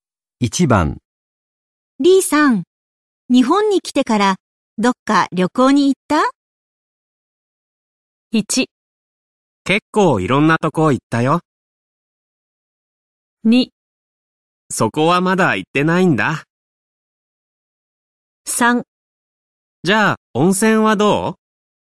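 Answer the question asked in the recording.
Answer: 1: 結構いろんなとこ行ったよ。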